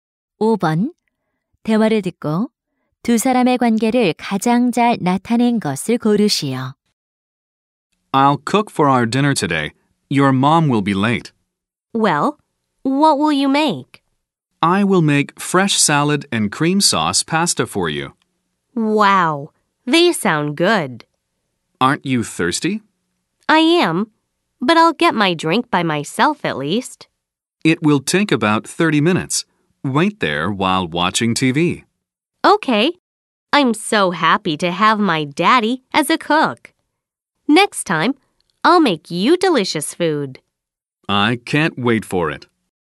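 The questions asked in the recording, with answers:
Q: 대화를 듣고 두 사람의 관계를 가장 잘 나타낸 것을 고르시오.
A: 아빠와 자녀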